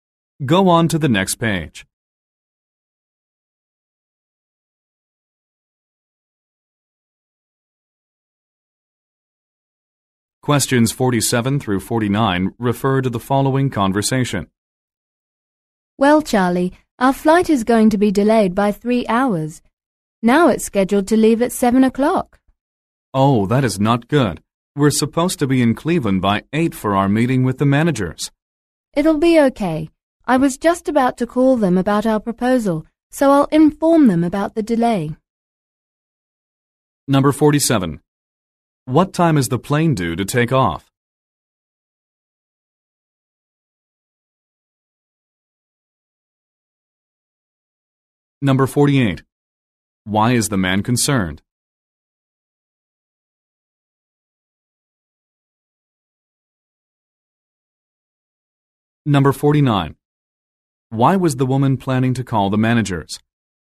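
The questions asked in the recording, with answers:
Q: What time is the plane due to take off?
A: 7 o'clock

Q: Why is the man concerned?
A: They need to be in Cleveland by 8 for a meeting

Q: Why was the woman planning to call the managers?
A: To talk about their proposal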